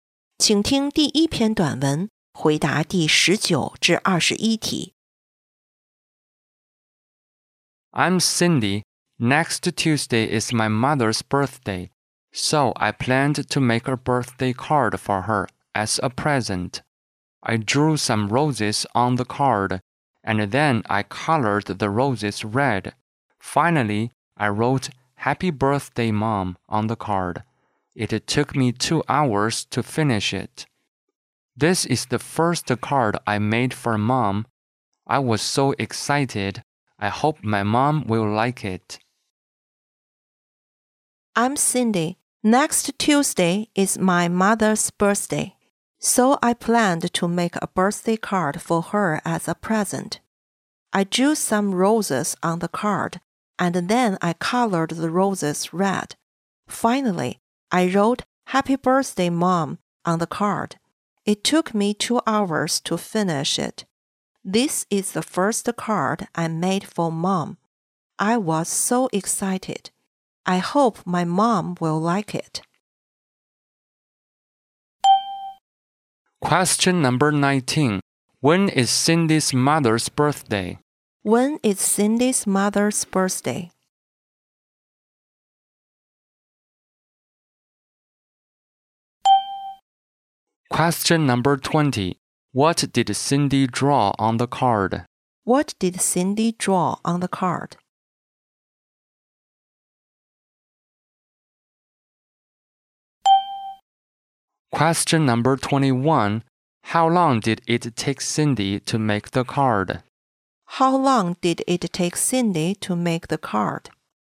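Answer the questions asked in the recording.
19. Next Tuesday
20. Roses
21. 2 hours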